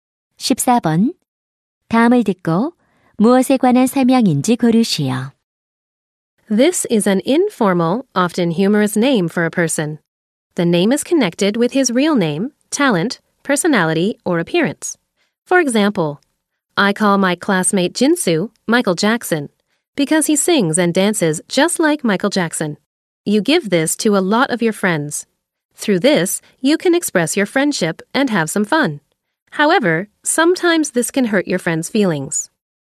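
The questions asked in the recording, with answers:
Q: 다음을 듣고 무엇에 관한 설명인지 고르시오.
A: 별명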